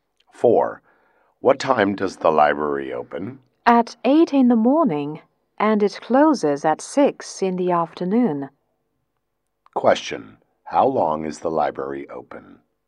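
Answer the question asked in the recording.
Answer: 10 hours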